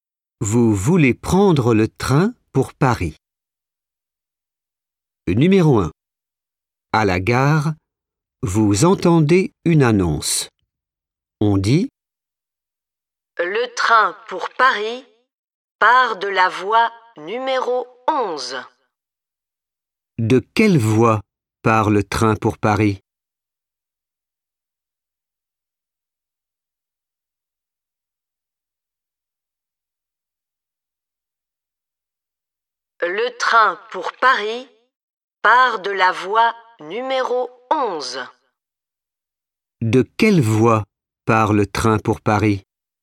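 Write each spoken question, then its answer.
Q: De quelle voie part le train pour Paris ?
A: La voie numéro 11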